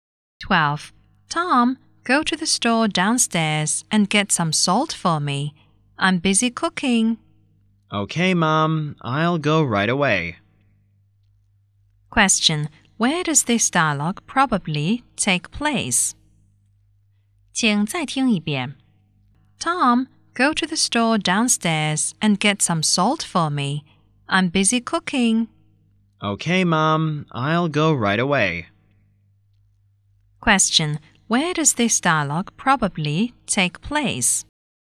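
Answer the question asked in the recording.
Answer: At home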